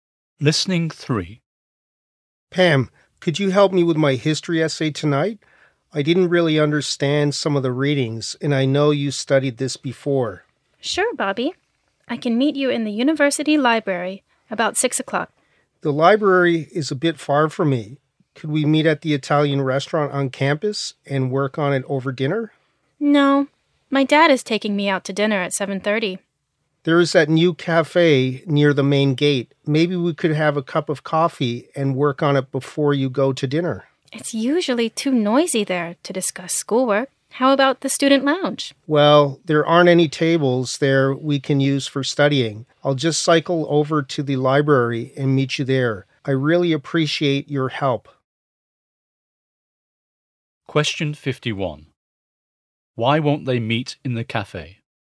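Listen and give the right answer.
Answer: It's usually too noisy there to discuss schoolwork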